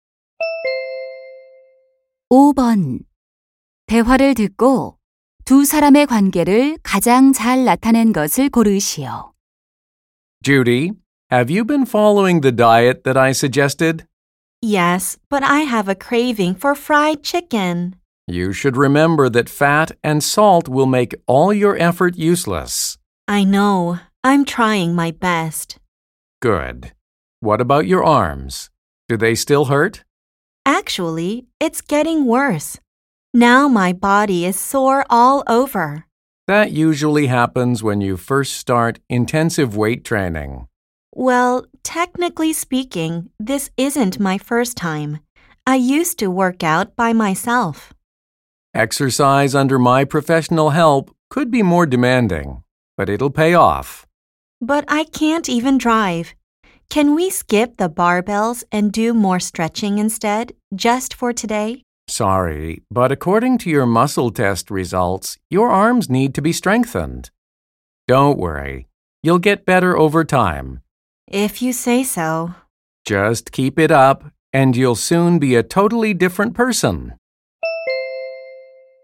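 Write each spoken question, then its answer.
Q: 대화를 듣고 두 사람의 관계를 가장 잘 나타낸 것을 고르시오.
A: 개인 트레이너 - 회원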